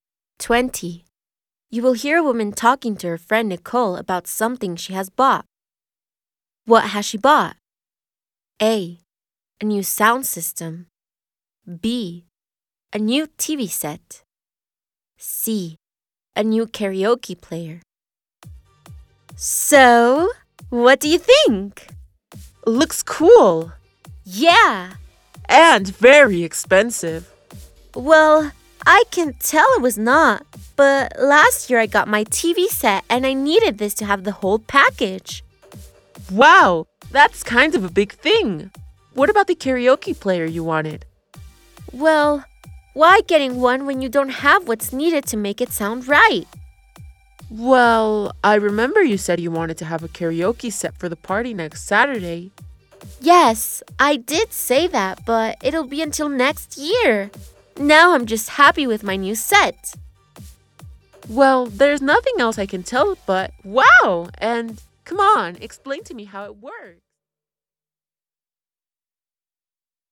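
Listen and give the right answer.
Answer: A: A new sound system.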